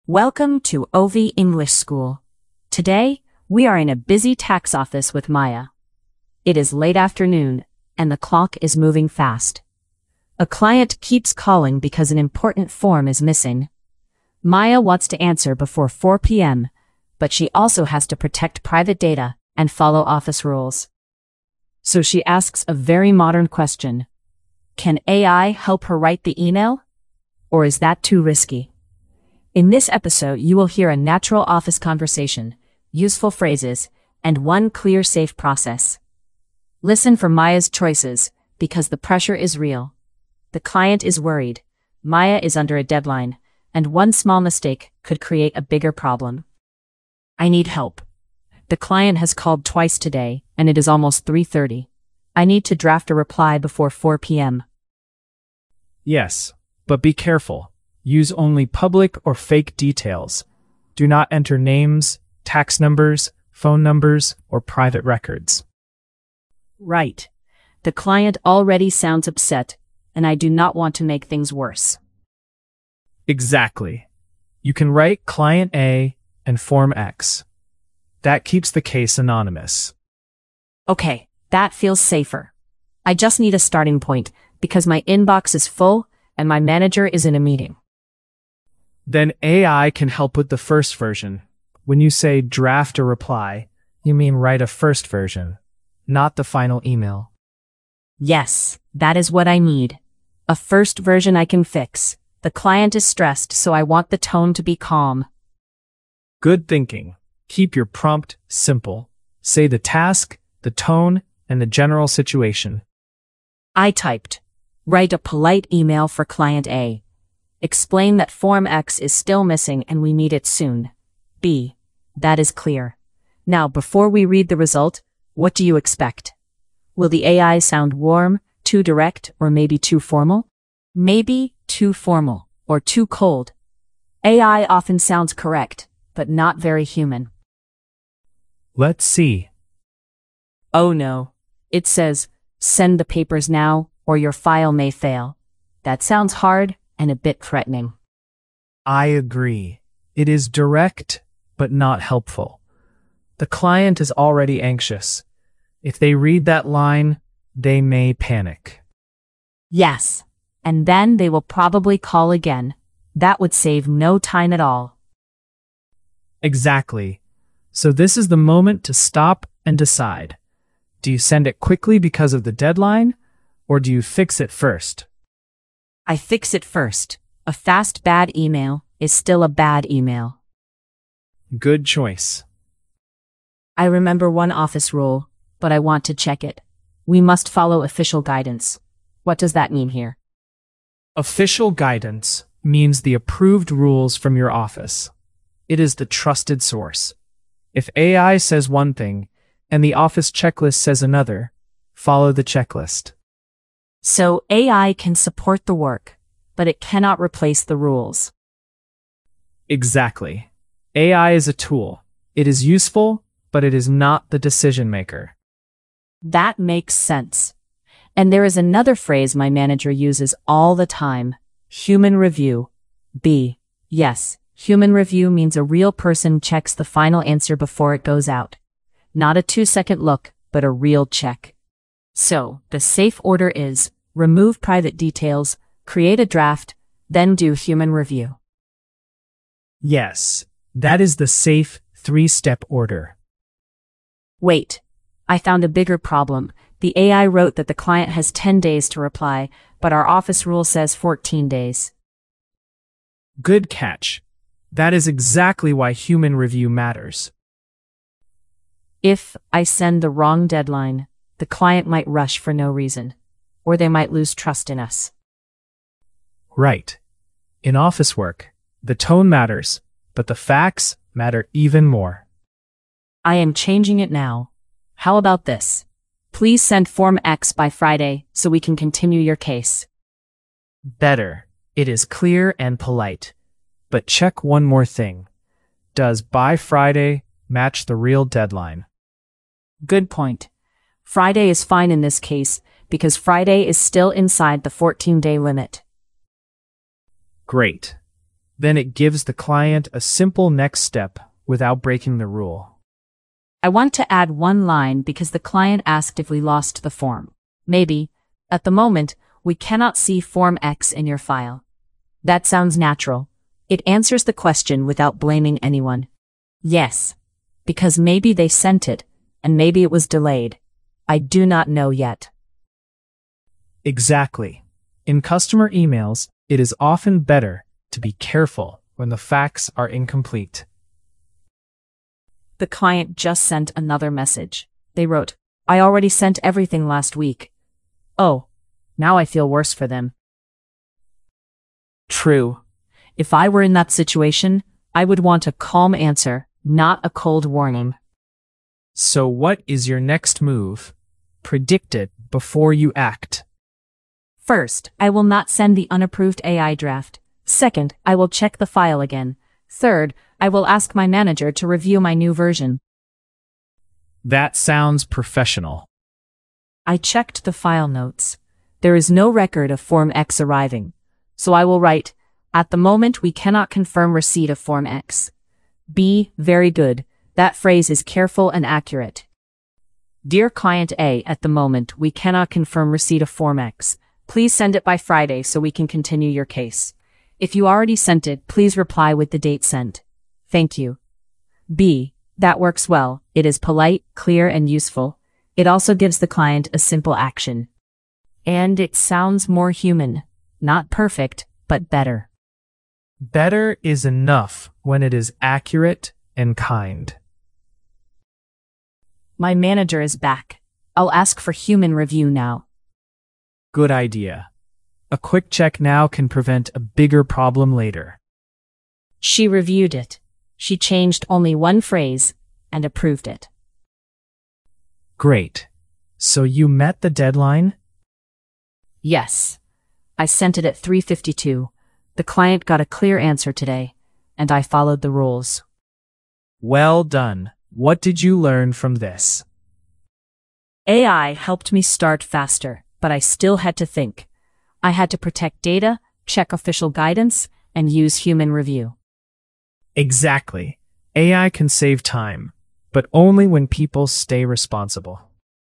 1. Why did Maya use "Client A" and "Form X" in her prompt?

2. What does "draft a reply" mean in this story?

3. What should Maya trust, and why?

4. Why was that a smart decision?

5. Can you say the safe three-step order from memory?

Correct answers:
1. Because fake details protect private data in the AI tool.
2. It means writing a first version that Maya can change later.
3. She should trust the official guidance, because office rules are the approved source.
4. The tone was too hard, and one fact was wrong.
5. Remove private details, make a draft, then do human review.

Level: Intermediate (B1)